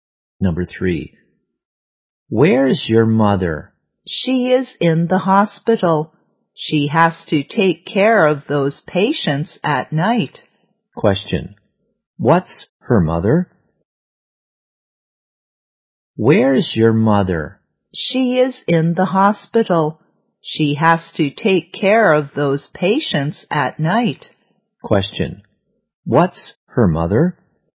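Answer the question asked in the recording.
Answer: A nurse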